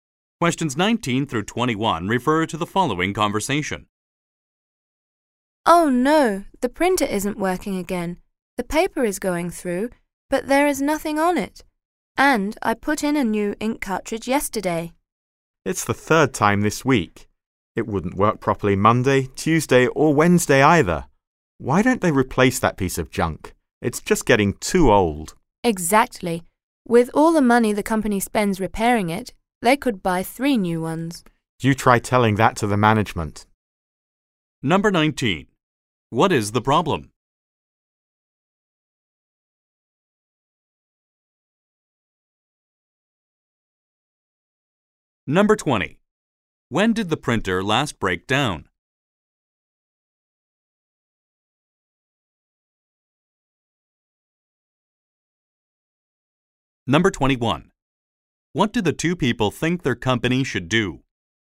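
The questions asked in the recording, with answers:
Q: What is the problem?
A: The printer isn't printing anything

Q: What do the two people think their company should do?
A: Replace the printer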